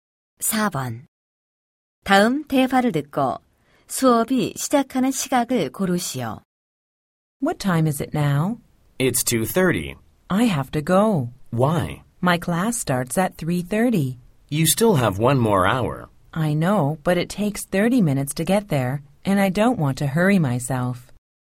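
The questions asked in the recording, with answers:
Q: 다음 대화를 듣고 수업이 시작하는 시각을 고르시오.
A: 3시 30분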